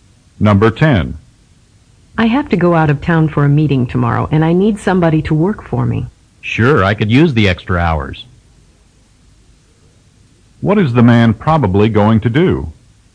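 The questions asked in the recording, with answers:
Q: What is the man probably going to do?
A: Work in the woman's place while she is out of town.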